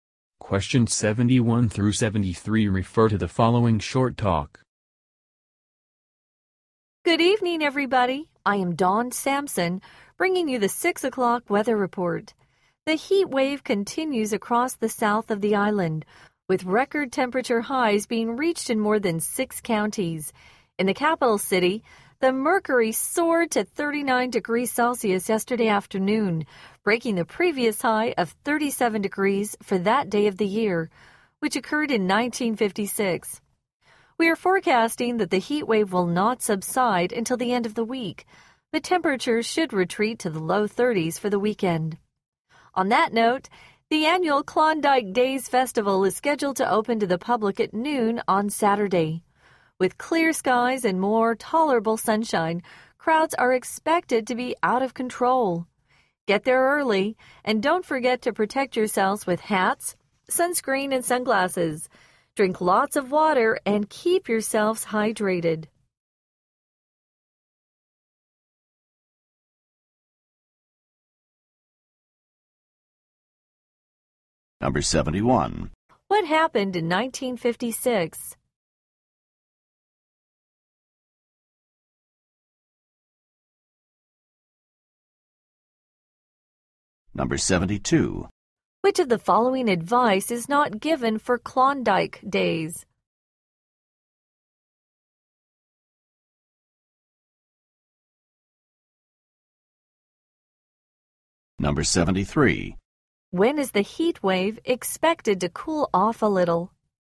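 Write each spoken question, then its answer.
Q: What happened in 1956?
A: The previous record high of 37 degrees for that day was set

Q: When is the heat wave expected to cool off a little?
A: At the end of the week / for the weekend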